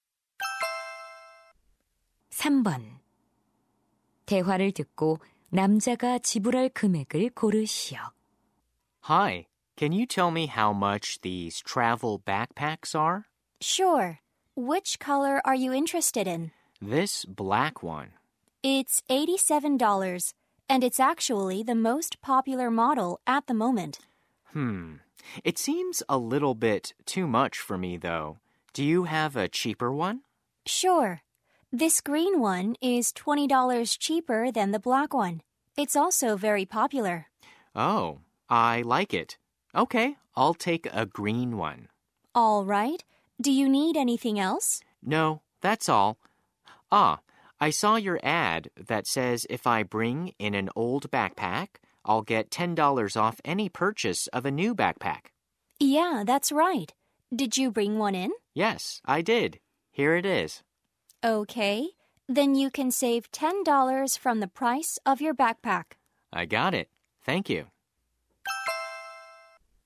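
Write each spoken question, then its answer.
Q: 대화를 듣고 남자가 지불할 금액을 고르시오.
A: $57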